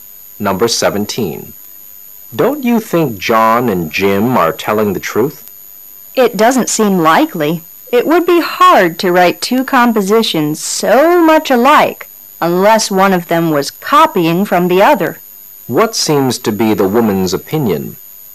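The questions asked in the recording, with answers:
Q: What seems to be the woman's opinion?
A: John and Jim are not telling the truth; one copied the other's composition.

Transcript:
[解析] M: Don't you think John and Jim are telling the truth? W: It doesn't seem likely. It would be hard to write two compositions so much alike unless one of them was copying from the other.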